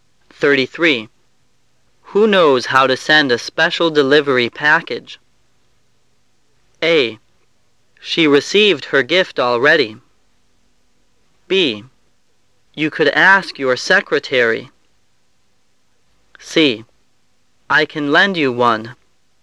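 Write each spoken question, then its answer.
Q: Who knows how to send a special delivery package?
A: B: You could ask your secretary.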